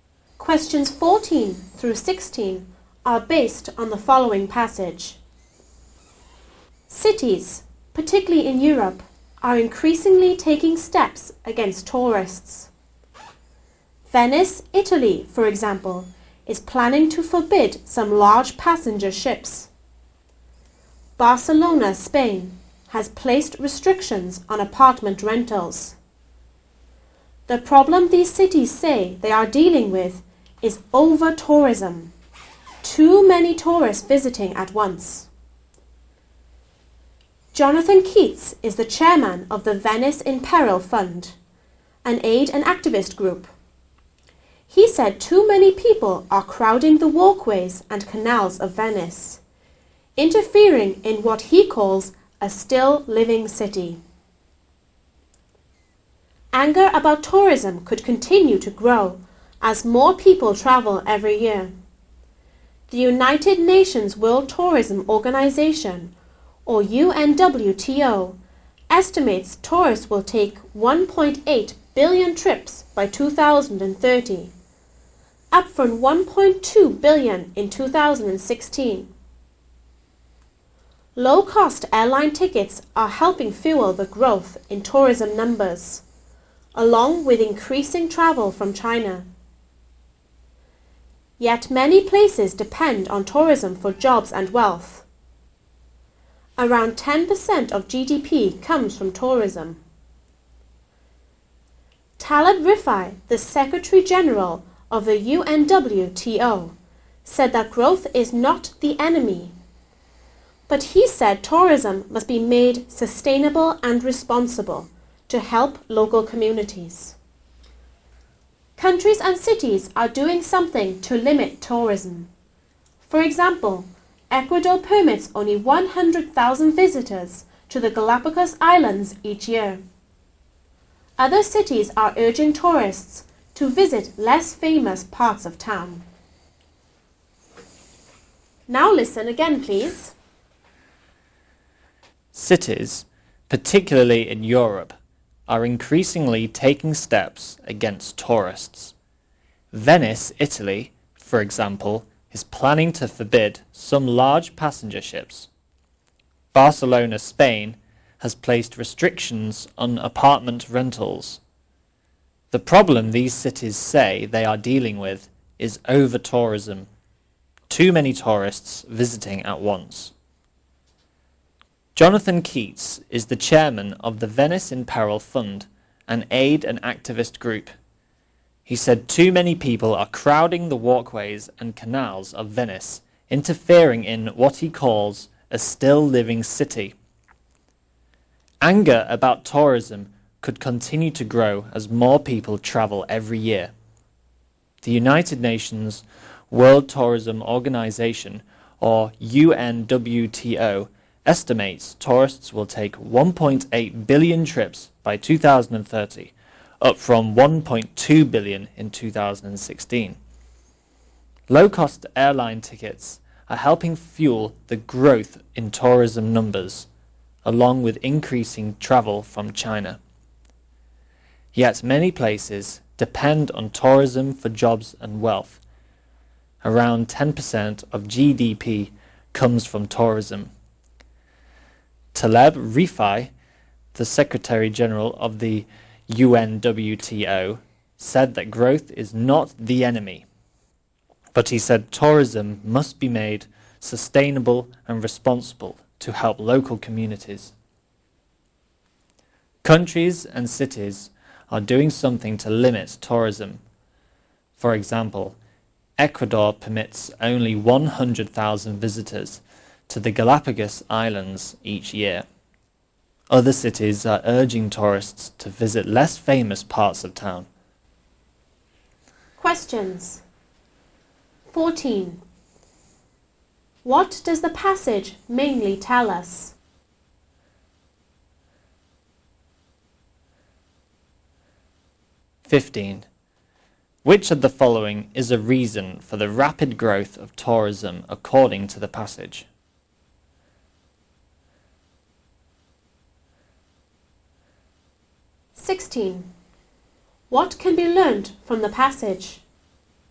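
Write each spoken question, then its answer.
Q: What does the passage mainly tell us?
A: Cities are taking steps against over-tourism

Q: Which of the following is a reason for the rapid growth of tourism according to the passage?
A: Low-cost airline tickets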